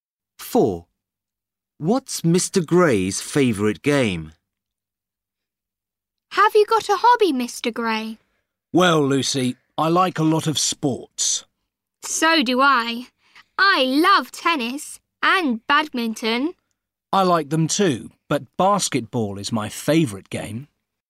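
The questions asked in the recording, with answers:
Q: What's Mr. Gray's favourite game?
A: basketball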